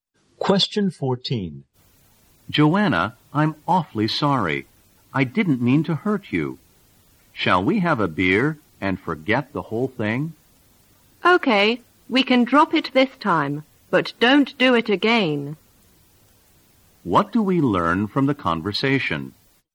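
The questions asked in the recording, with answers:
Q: What do we learn from the conversation?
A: The man apologized for hurting Joanna, and she forgave him this time.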